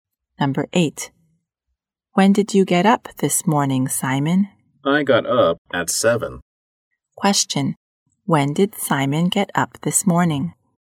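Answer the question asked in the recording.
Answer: At 7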